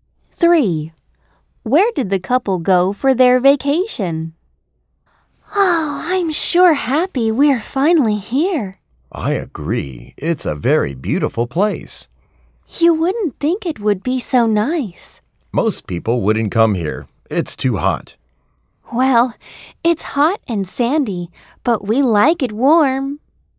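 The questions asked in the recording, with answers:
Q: Where did the couple go for their vacation?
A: The desert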